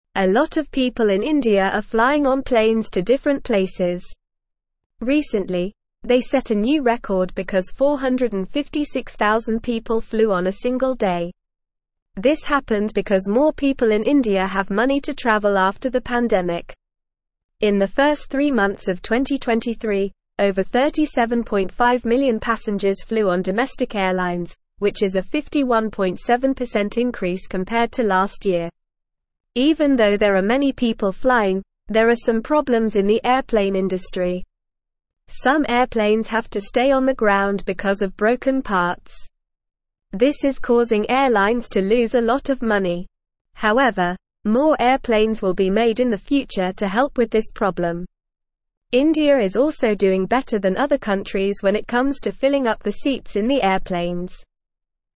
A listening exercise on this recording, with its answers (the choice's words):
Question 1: What did people in India recently set a new record for?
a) eating a lot of food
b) flying on a single day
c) driving cars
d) swimming in the ocean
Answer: flying on a single day

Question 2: How many passengers flew on domestic airlines in the first three months of 2023?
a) 10,000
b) 37.5 million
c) 100 million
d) 500 million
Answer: 37.5 million

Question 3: What will be done to help with the problem of broken parts on airplanes?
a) nothing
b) people will fix the parts themselves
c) more airplanes will be made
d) the airplanes will fly slower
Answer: more airplanes will be made

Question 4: How is India doing compared to other countries when it comes to filling up the seats in airplanes?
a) worse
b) the same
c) better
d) they don't have airplanes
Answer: better

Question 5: Why are there more people flying on planes in India?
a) because of the pandemic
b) because they want to swim in the ocean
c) because they have more money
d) because they like to drive cars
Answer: because they have more money

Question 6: A lot of people in (1)_______ are flying on planes to different places.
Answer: India

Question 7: This happened because more people in India have money to travel after the (2)________.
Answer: pandemic

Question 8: In the first three months of 2023, over 37.5 million passengers flew on domestic airlines, which is a 51.7% increase compared to (3)_______ year.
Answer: last

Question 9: Some airplanes have to stay on the ground because of (4)________ parts.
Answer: broken

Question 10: However, more airplanes will be made in the future to help with this (5)_______.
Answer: problem

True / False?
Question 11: Fewer people in India are flying on planes to different places.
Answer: False

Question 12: 456,000 people flew on a single day in India.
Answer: True

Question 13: People in India have more money to travel after the pandemic.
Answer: True

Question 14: There has been a decrease in the number of people flying on airplanes in India compared to last year.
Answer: False

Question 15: Some airplanes have to stay on the ground in India because of broken parts.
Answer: True

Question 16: India is not doing well compared to other countries when it comes to filling up the seats in airplanes.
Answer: False

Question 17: More airplanes will be made in the future to help airlines in India.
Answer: True

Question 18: How many people recently flew on a single day in India?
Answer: 456,000 people flew on a single day in India recently.

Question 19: How much did the number of domestic airline passengers increase in the first three months of 2023?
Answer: The number of domestic airline passengers increased by 51.7% in the first three months of 2023.

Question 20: Will more airplanes be made in the future to help with the broken parts problem?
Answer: Yes, more airplanes will be made in the future to help with the broken parts problem.

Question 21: Is India doing better than other countries when it comes to filling up airplane seats?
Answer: Yes, India is doing better than other countries when it comes to filling up airplane seats.

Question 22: What do people use airplanes for in India?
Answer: People in India use airplanes to travel to different places.

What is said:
A lot of people in India are flying on planes to different places. Recently, they set a new record because 456,000 people flew on a single day! This happened because more people in India have money to travel after the pandemic. In the first three months of 2023, over 37.5 million passengers flew on domestic airlines, which is a 51.7% increase compared to last year. Even though there are many people flying, there are some problems in the airplane industry. Some airplanes have to stay on the ground because of broken parts. This is causing airlines to lose a lot of money. However, more airplanes will be made in the future to help with this problem. India is also doing better than other countries when it comes to filling up the seats in the airplanes.

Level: Level 1